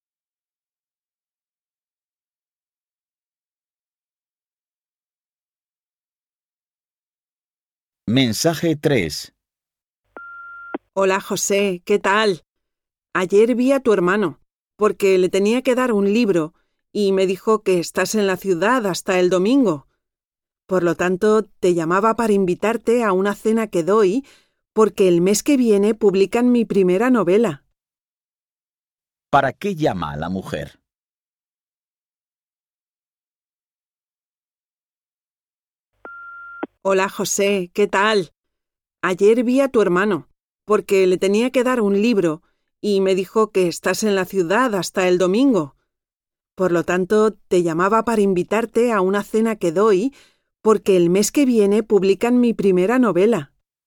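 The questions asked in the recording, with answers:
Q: ¿Para qué llama a la mujer?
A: Para invitar a José a una cena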